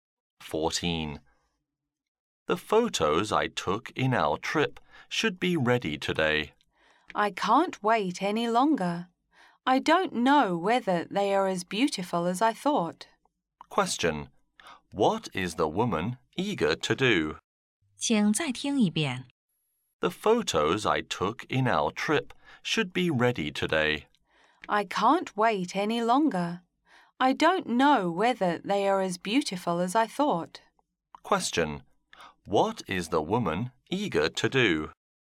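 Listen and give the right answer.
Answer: See the photos from her trip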